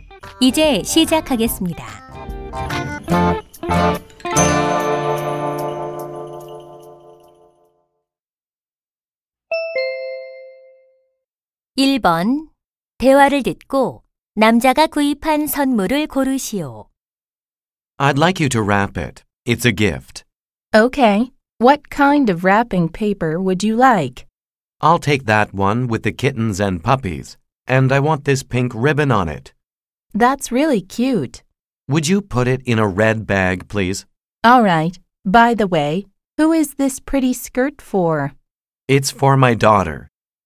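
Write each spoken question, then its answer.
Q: 대화를 듣고 남자가 구입한 선물을 고르시오.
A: 치마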